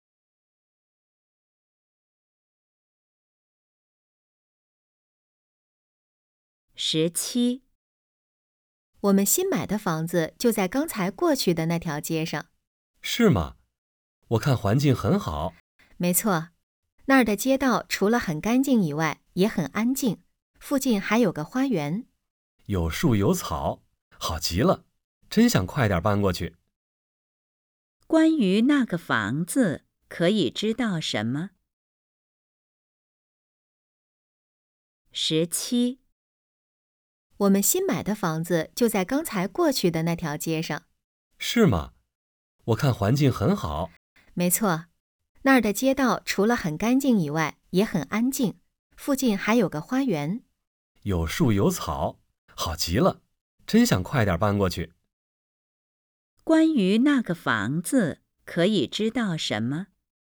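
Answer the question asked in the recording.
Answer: 环境很好,街道干净安静,附近有花园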